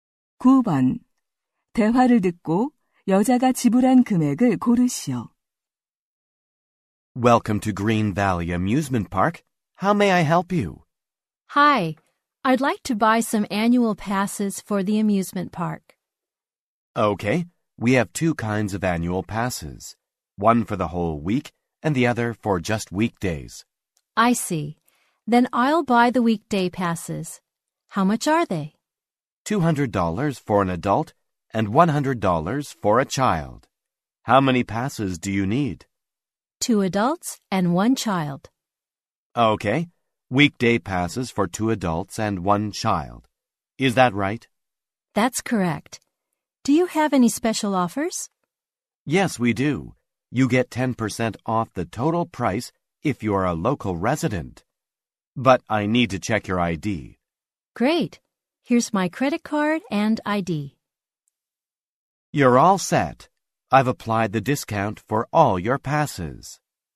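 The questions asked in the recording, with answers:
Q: 대화를 듣고 여자가 지불한 금액을 고르시오.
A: $450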